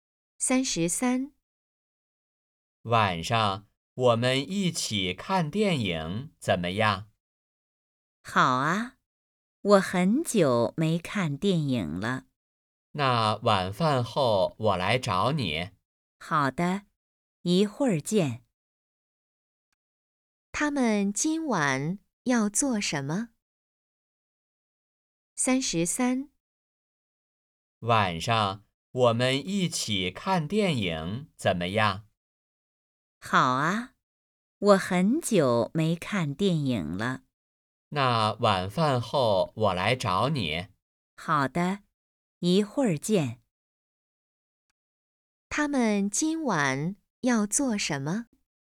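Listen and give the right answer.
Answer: 看电影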